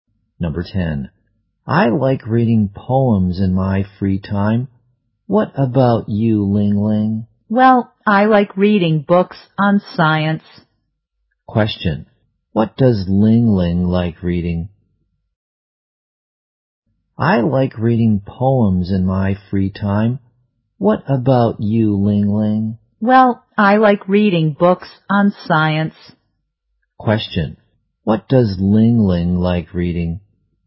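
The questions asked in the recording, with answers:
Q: What does Ling Ling like reading?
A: Books on science.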